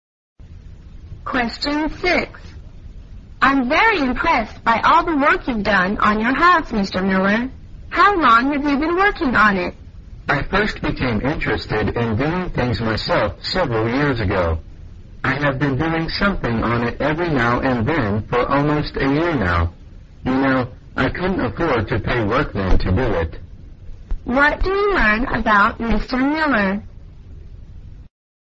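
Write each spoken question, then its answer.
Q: What do you learn about Mr.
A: He has been working on his house himself for almost a year because he couldn't afford workmen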